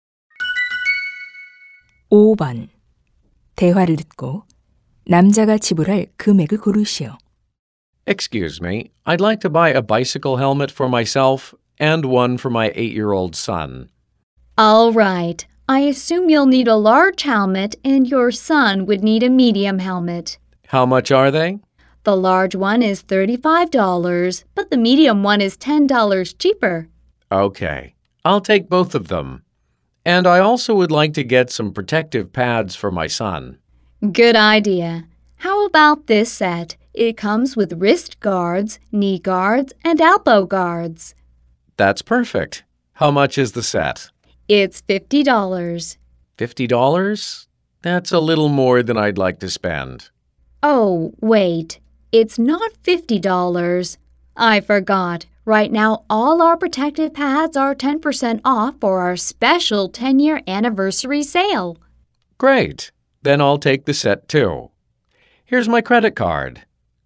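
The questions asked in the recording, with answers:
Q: 대화를 듣고 남자가 지불할 금액을 고르시오.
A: $105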